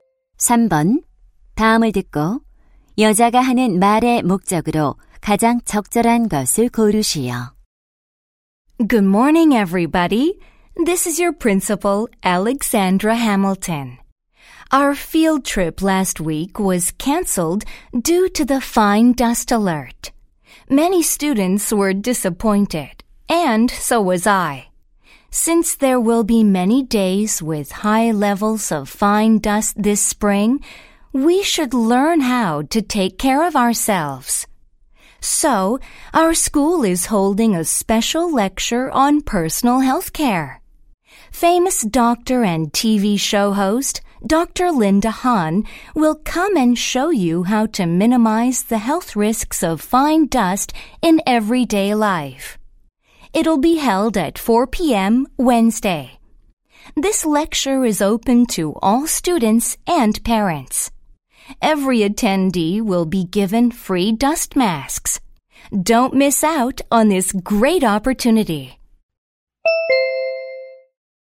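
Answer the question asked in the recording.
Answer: 미세먼지 관련 개인 건강관리 특강을 안내하려고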